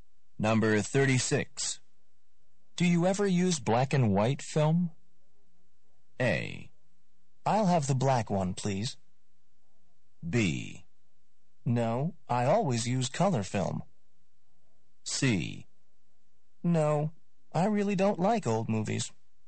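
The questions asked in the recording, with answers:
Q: Do you ever use black and white film?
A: B: No, I always use color film.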